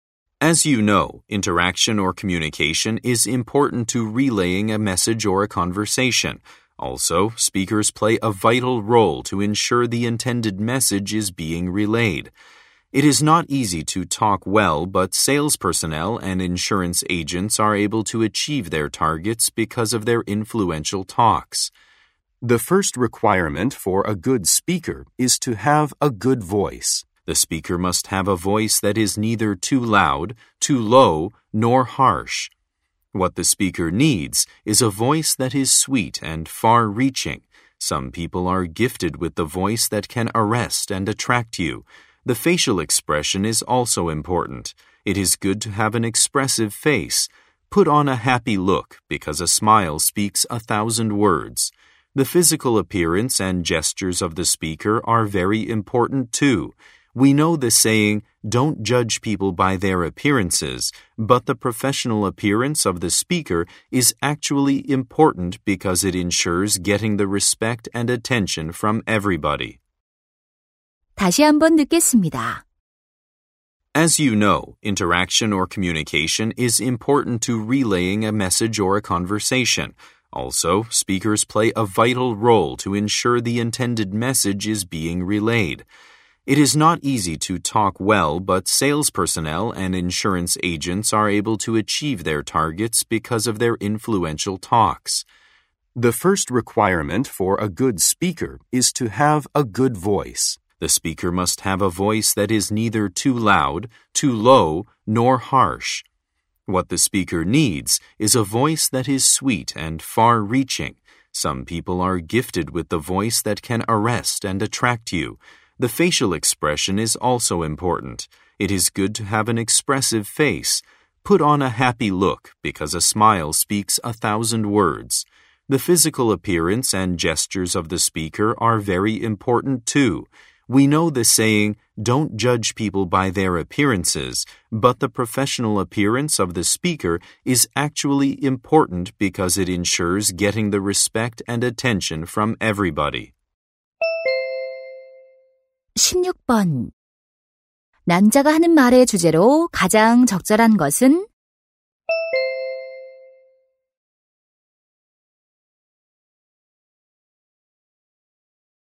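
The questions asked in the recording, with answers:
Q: 남자가 하는 말의 주제로 가장 적절한 것은?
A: 훌륭한 연설자가 갖춰야 할 조건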